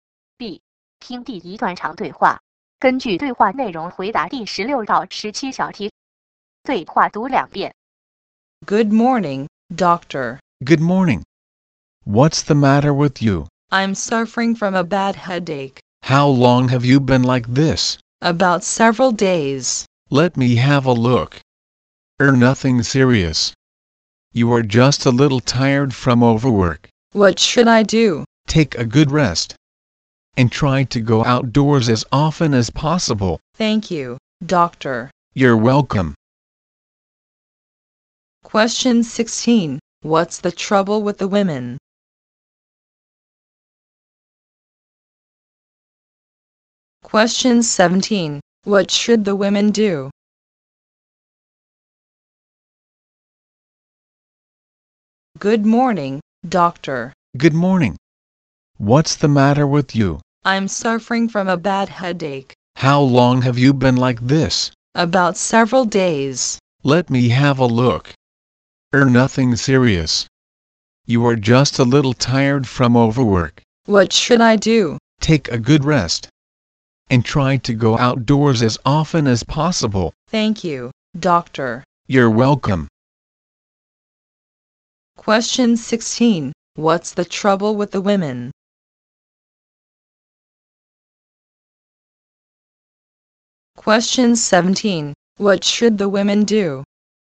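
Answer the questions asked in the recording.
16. A bad headache
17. Take a good rest and go outdoors often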